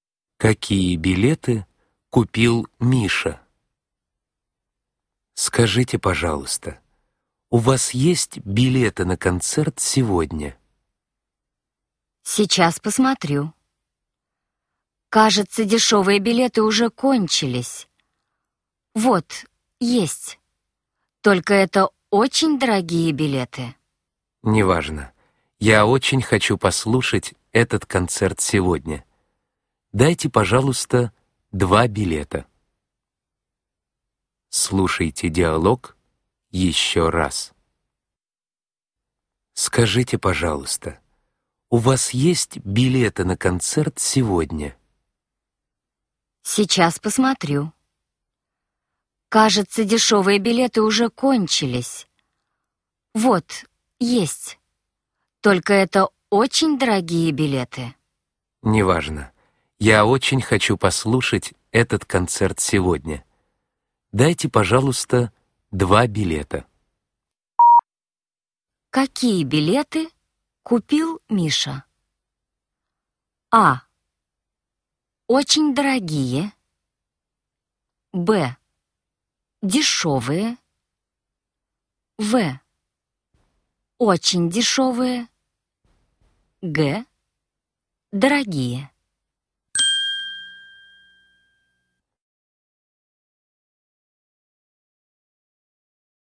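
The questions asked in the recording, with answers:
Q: Какие билеты купил Миша?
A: А: Очень дорогие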